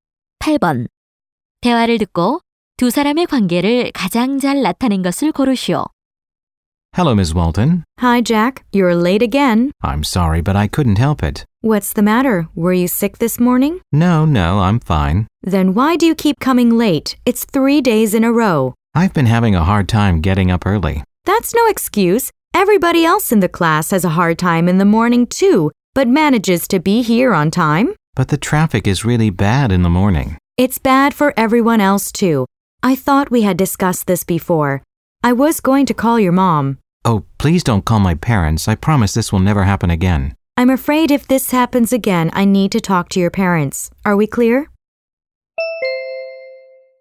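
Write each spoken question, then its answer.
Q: 대화를 듣고 두 사람의 관계를 가장 잘 나타낸 것을 고르시오.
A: 교사 - 학생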